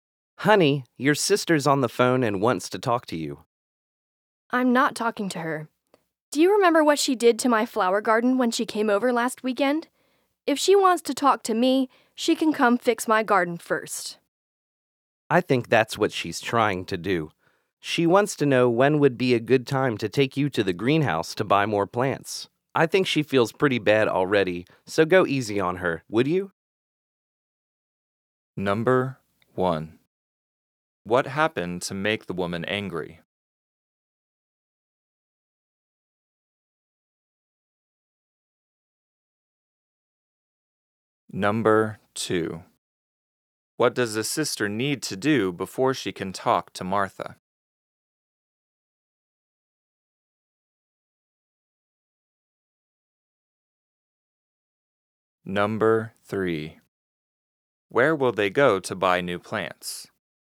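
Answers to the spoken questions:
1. Her sister damaged her flower garden last weekend.
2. Fix her garden.
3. The greenhouse.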